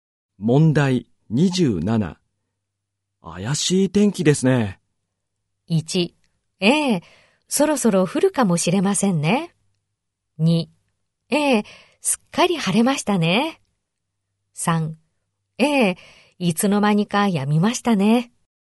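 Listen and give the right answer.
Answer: 1: ええ、そろそろ降るかもしれませんね。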